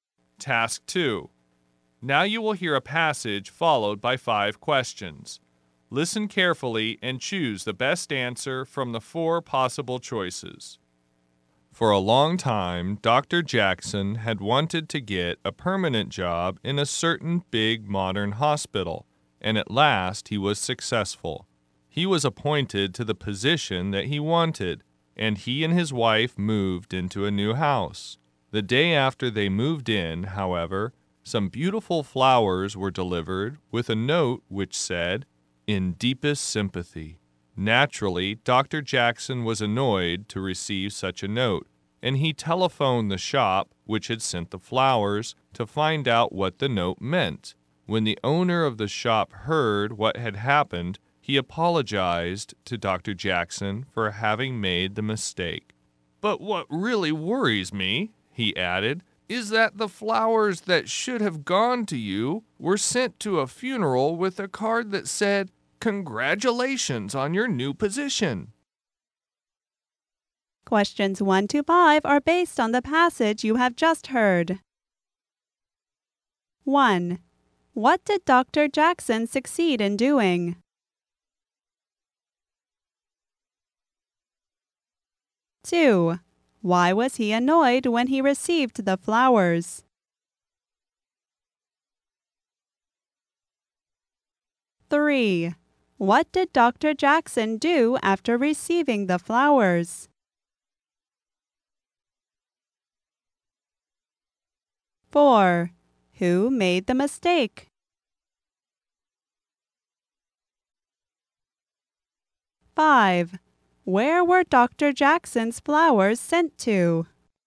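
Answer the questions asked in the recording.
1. Getting a permanent job in a big modern hospital
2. The note said "In deepest sympathy"
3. He telephoned the flower shop
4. The flower shop
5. A funeral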